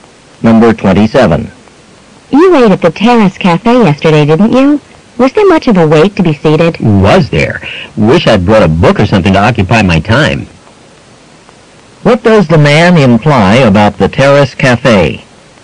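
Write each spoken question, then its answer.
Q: What does the man imply about the Terrace Cafe?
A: He had a long wait to be seated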